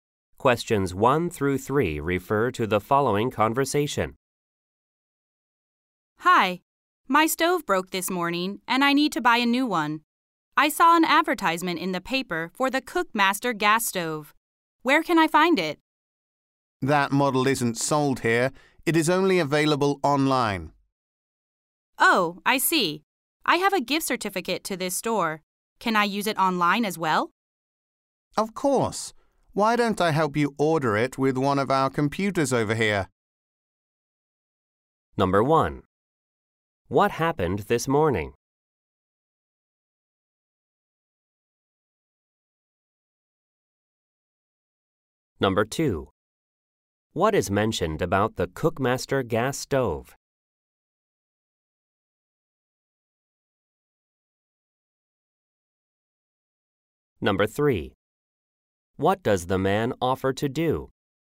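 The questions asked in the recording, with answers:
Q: What happened this morning?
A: Her stove broke.

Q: What is mentioned about the Cookmaster gas stove?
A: It is only available online.

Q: What does the man offer to do?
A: Help her order it online on a store computer.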